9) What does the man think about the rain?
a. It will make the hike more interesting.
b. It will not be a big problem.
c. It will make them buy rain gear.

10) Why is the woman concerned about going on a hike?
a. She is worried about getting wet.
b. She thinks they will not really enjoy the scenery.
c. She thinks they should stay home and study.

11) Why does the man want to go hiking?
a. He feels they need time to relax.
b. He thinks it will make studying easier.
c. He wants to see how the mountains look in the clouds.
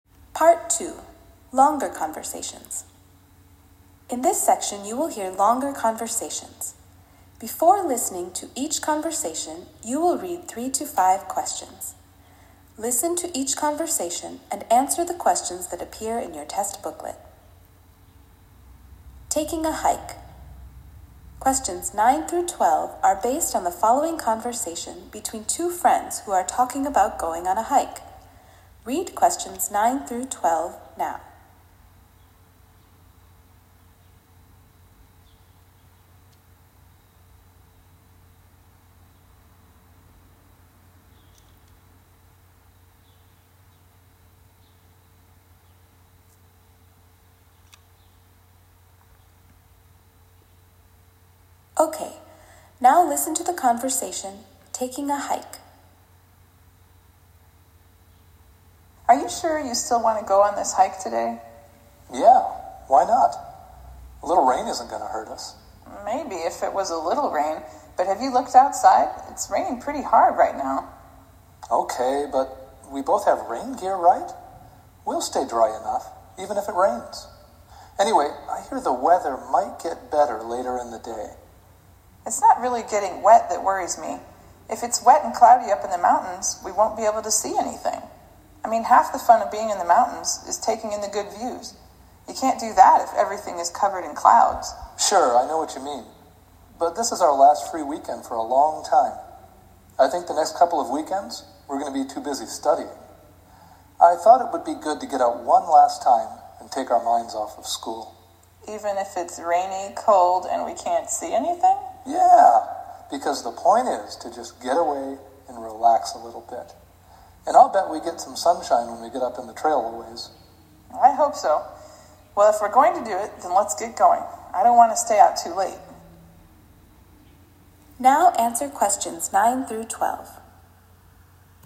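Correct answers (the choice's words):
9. It will not be a big problem.
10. She thinks they will not really enjoy the scenery.
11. He feels they need time to relax.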